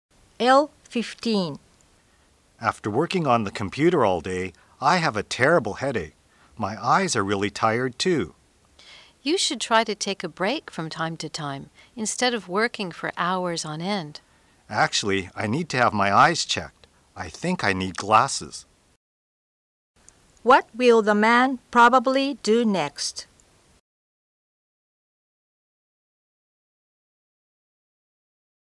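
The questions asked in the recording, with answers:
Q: What will the man probably do next?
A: Have his eyes checked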